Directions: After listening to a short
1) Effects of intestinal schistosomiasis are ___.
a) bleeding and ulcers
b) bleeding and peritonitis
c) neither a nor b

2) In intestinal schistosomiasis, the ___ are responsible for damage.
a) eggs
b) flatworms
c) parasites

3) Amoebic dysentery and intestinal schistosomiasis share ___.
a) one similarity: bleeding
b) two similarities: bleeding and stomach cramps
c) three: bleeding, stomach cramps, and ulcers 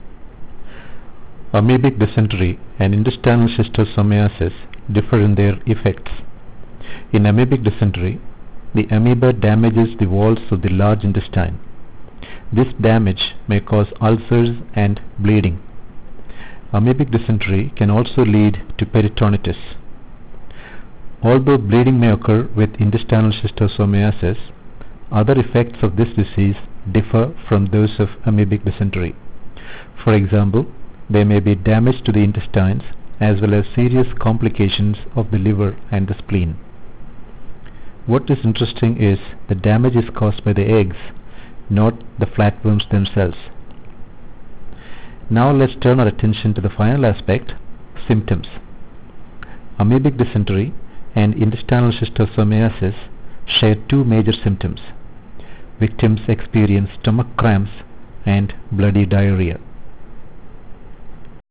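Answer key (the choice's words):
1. neither a nor b
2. eggs
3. two similarities: bleeding and stomach cramps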